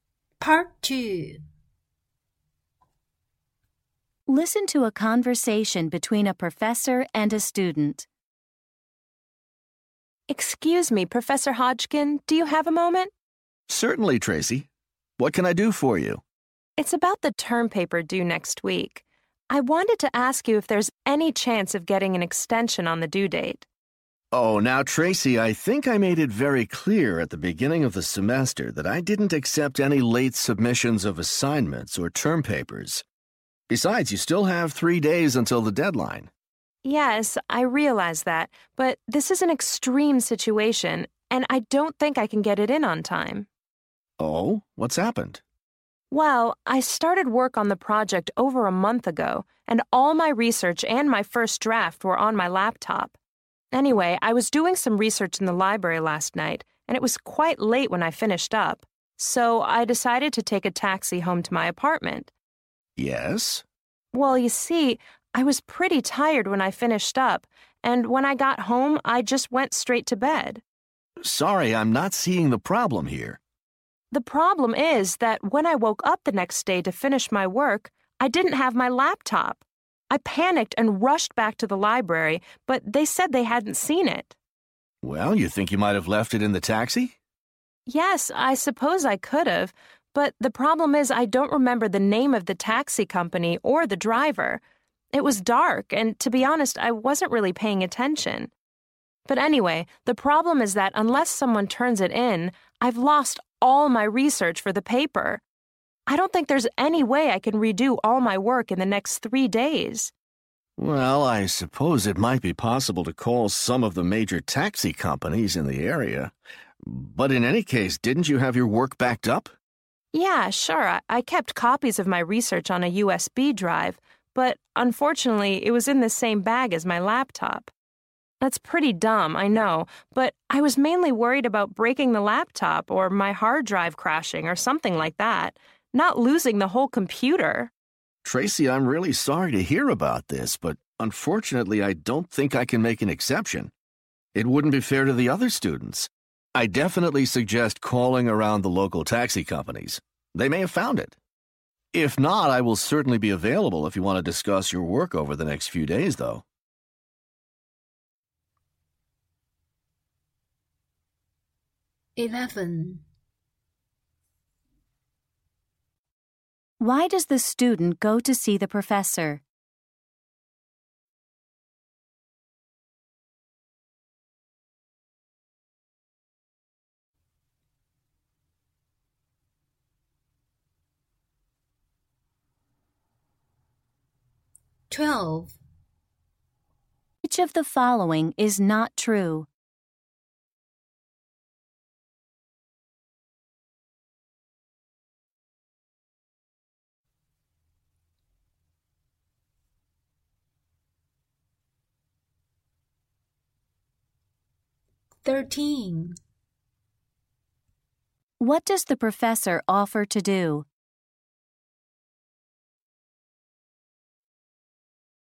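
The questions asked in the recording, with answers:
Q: does the student go to see the professor?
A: To ask for an extension on her term paper

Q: What does the professor offer to do?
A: Be available to discuss her work over the next few days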